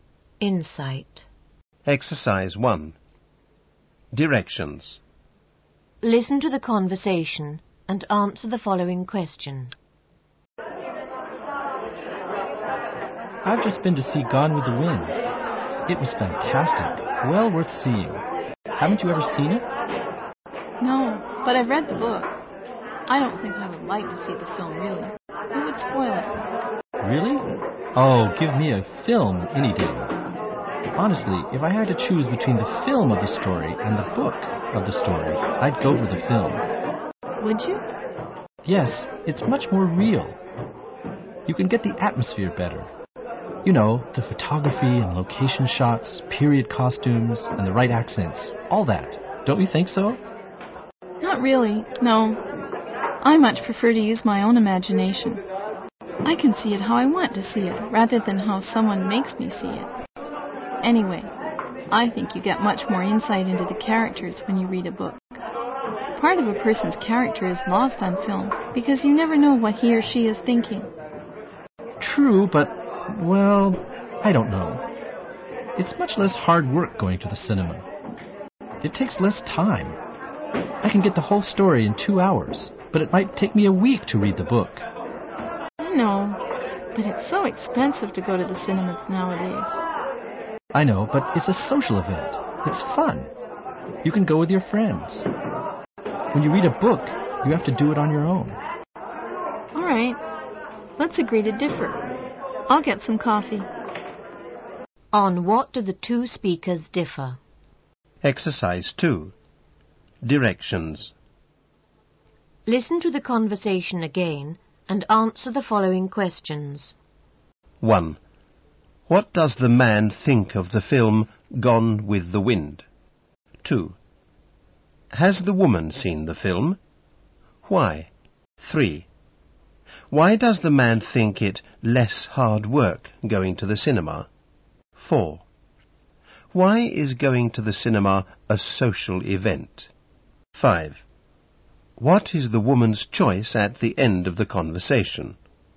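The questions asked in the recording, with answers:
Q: On what do the two speakers differ?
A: Whether a film or the book of a story is better

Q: What does the man think of the film Gone with the Wind?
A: Fantastic, well worth seeing

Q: Has the woman seen the film?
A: No; she has read the book and thinks the film would spoil it

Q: Why does the man think it less hard work going to the cinema?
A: It takes less time: the whole story in 2 hours

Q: Why is going to the cinema a social event?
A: You can go with your friends

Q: What is the woman's choice at the end of the conversation?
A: The book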